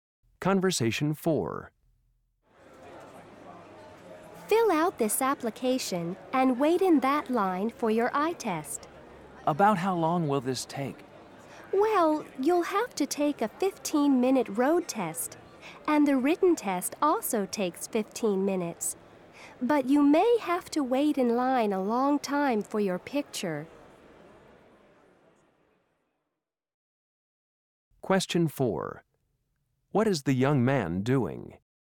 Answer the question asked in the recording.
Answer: Will you send me my driver's license, or do I have to pick it up in person?